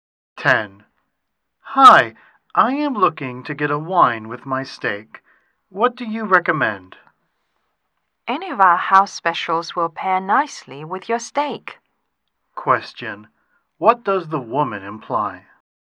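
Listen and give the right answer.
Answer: Any of the house specials goes well with the steak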